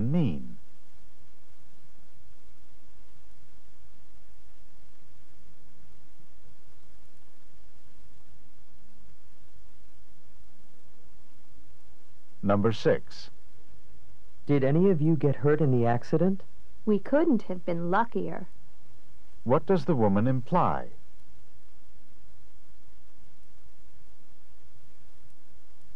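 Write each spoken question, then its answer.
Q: What does the woman imply?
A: They were very lucky; no one was hurt.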